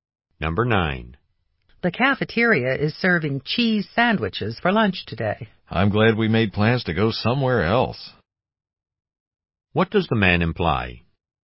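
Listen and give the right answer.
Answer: He doesn't want to eat cheese sandwiches at the cafeteria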